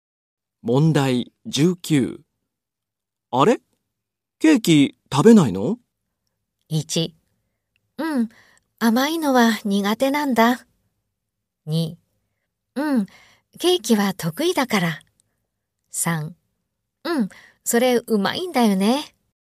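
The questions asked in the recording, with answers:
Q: あれ?ケーキ食べないの?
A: 1: うん、甘いのは苦手なんだ。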